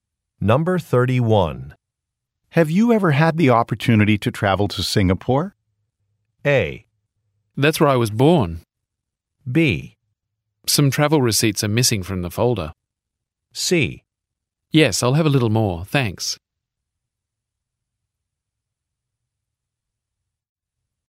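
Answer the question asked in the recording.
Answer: A: That's where I was born.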